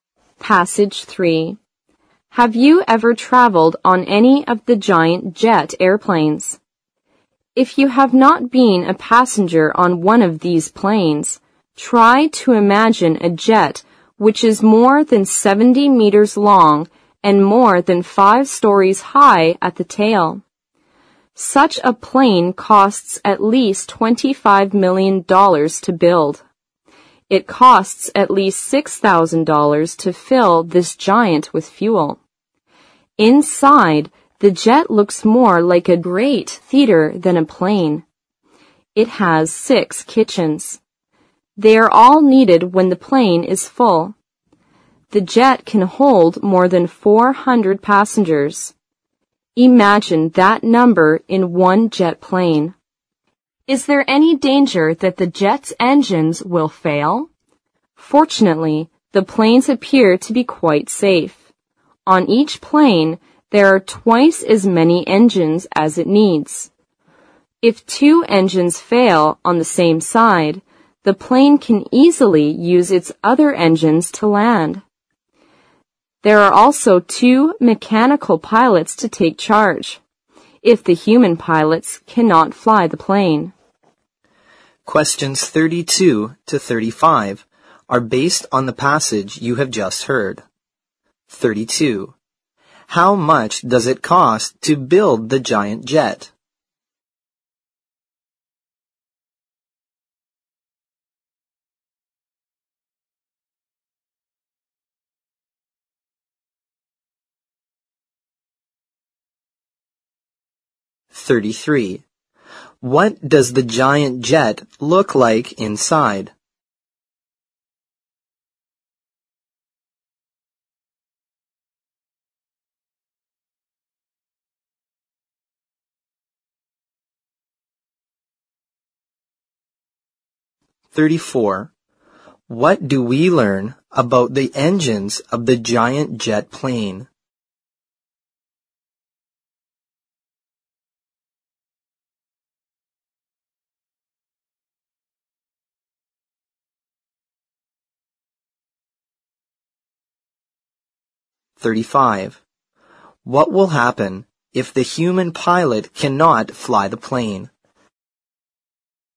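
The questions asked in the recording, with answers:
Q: How much does it cost to build the giant jet?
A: At least $25 million

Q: What does the giant jet look like inside?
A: Like a great theater

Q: What do we learn about the engines of the giant jet plane?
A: It has twice as many engines as it needs

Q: What will happen if the human pilot cannot fly the plane?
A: Two mechanical pilots will take charge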